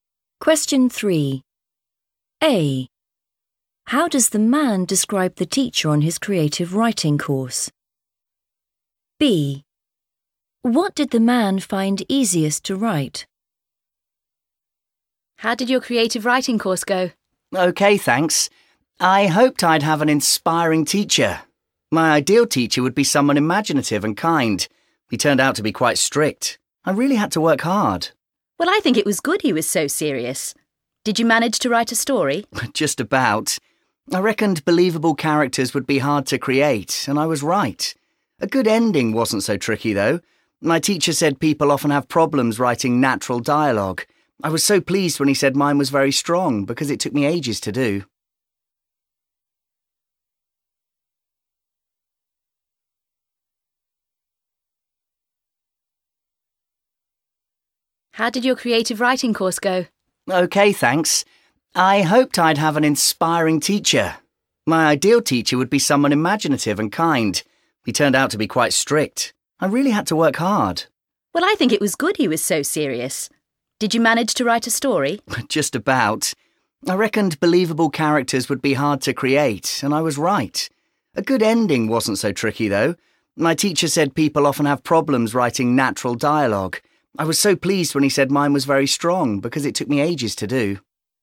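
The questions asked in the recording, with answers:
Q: How does the man describe the teacher on his creative writing course?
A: strict

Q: What did the man find easiest to write?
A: a good ending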